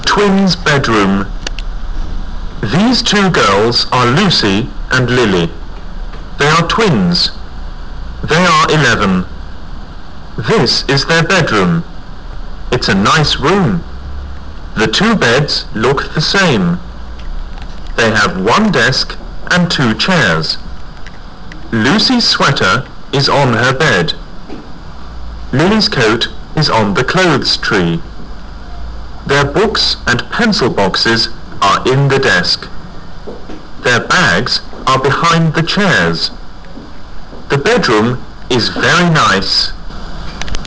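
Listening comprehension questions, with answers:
I. Listen carefully and write " T "for Ture and "F" for False beside the statements.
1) Lily and Lucy are brothers.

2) They have two desks and one chair.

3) Their beds look the same.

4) Lily's coat is on her bed.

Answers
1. F
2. F
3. T
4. F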